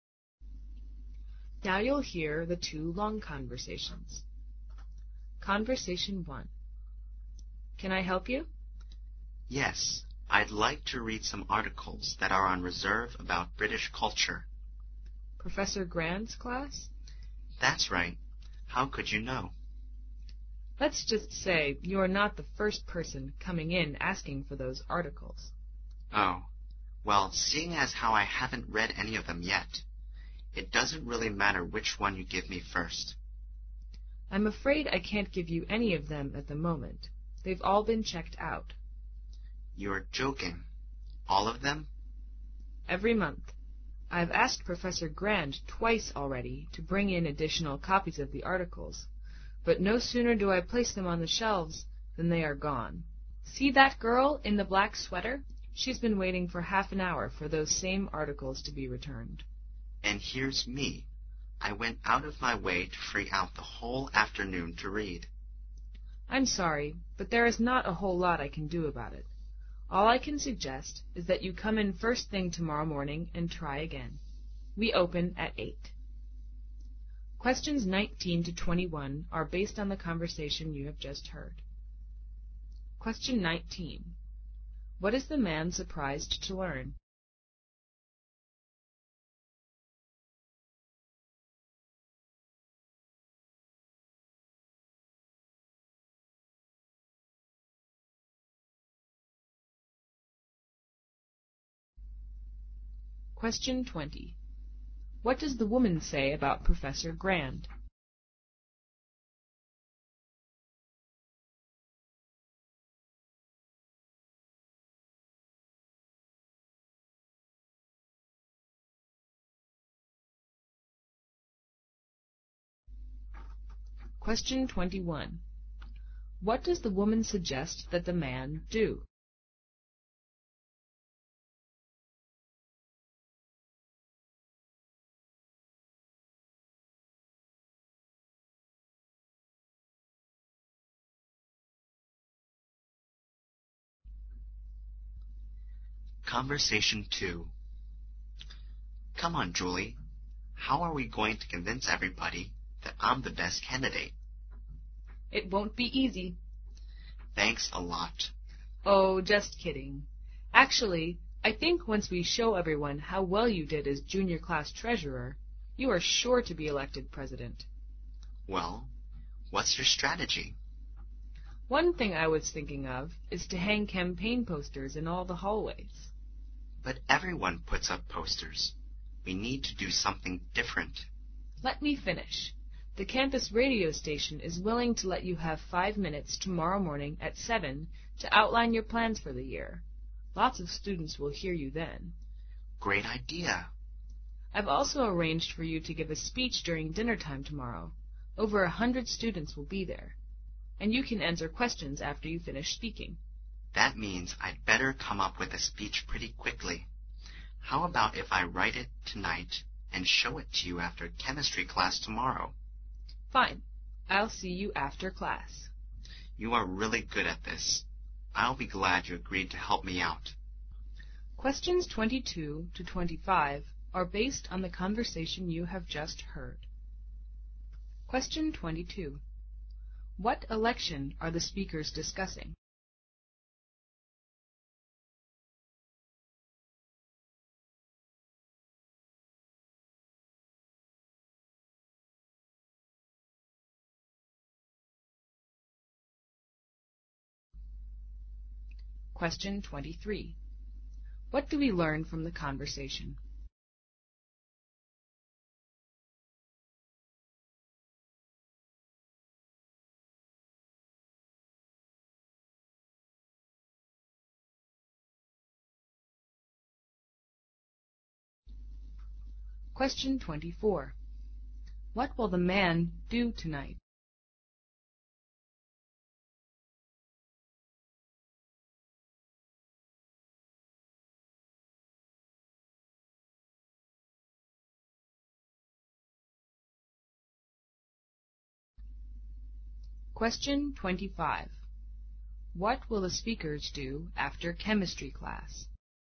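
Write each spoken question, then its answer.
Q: What is the man surprised to learn?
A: All the articles have been checked out

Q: What does the woman say about Professor Grand?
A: She has asked him twice to bring in more copies

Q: What does the woman suggest that the man do?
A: Come in first thing tomorrow morning

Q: What election are the speakers discussing?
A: Student class president

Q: What will the man do tonight?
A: Write his speech

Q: What will the speakers do after chemistry class?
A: Meet to go over the speech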